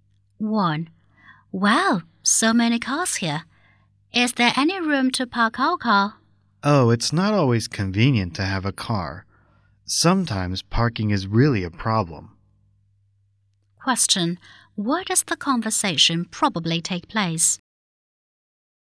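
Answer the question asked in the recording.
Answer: In a parking lot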